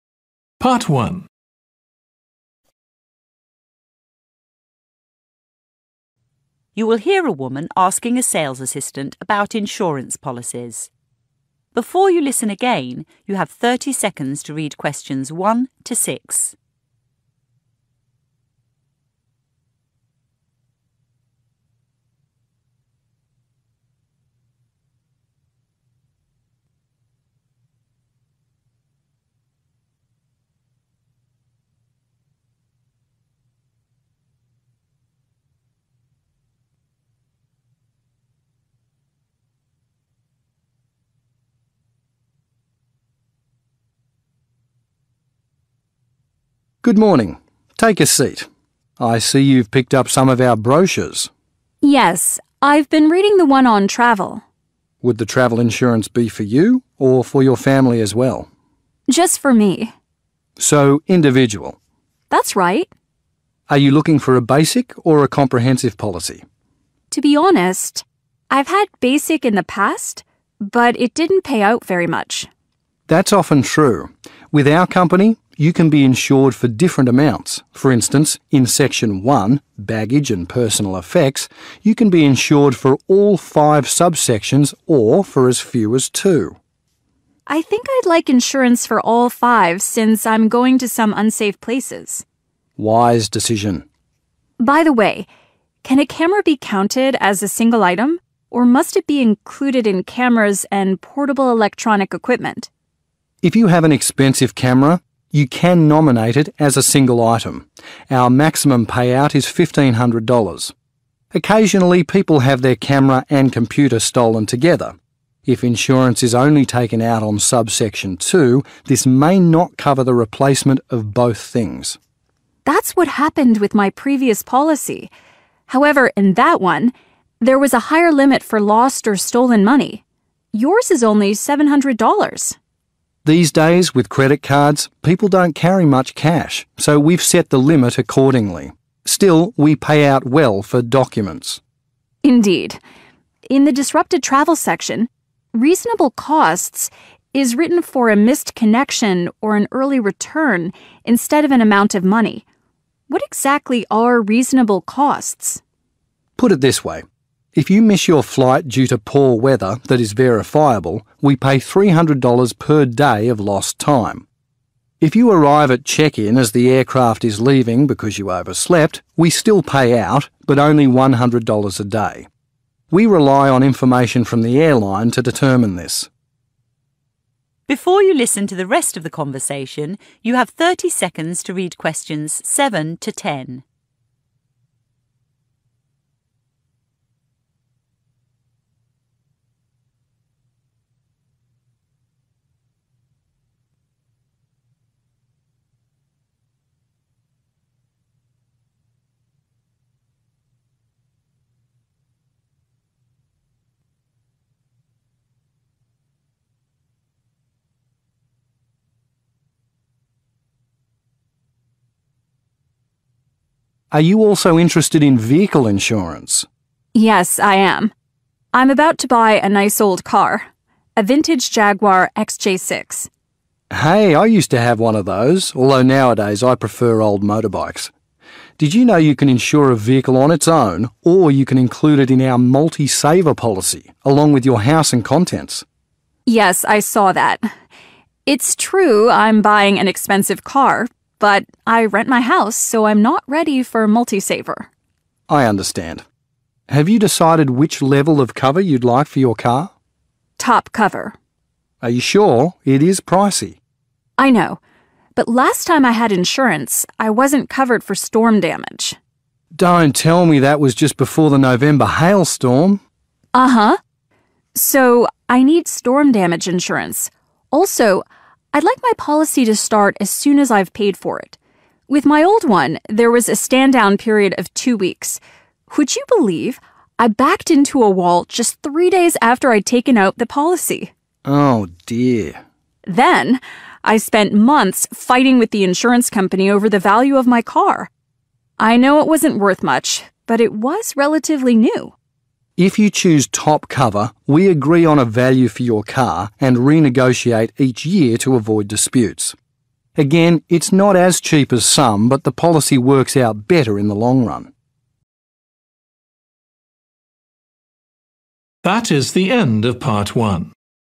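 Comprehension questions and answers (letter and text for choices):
Complete the notes below. Write ONE WORD AND/OR A NUMBER for each answer.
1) Type: 1 Comprehensive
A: individual

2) single 2: $1,500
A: item

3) cameras and portable electronic 3: $2,500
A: equipment

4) money: $ 4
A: 700

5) disrupted travel: rational 5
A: costs

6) missed connections or early return, as verified by the 6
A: airline

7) The woman will buy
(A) a new motorbike.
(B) an old car.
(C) a new car.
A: (B) an old car.

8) The woman does not want to insure her vehicle with a Multi-saver policy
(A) because it has too many conditions.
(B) because it is rather expensive.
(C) because it benefits homeowners.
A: (C) because it benefits homeowners.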